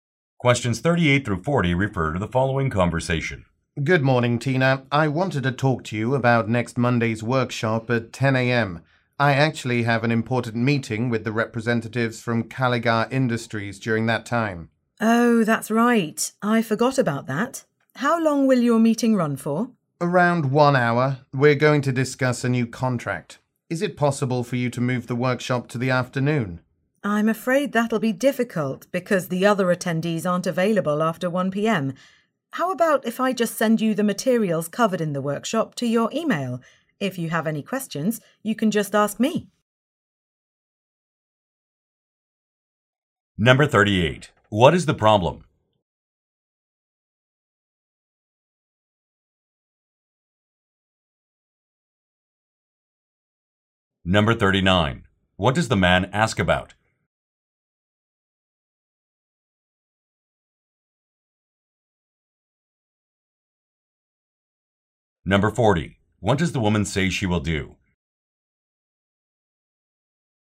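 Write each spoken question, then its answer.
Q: What is the problem?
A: The man has an important meeting at the same time as the workshop

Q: What does the man ask about?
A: Moving the workshop to the afternoon

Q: What does the woman say she will do?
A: Email him the workshop materials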